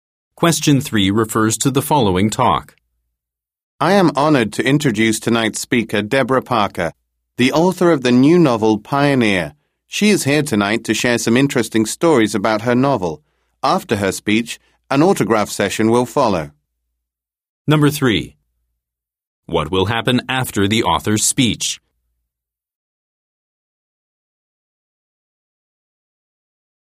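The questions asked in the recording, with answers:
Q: What will happen after the author's speech?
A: An autograph session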